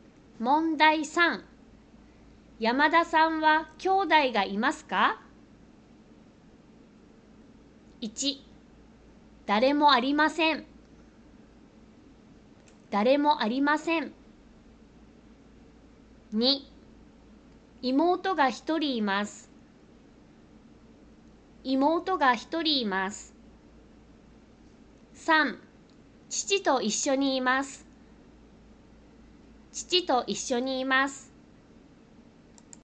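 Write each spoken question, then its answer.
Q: 山田さんは兄弟がいますか?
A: 2: 妹が一人います。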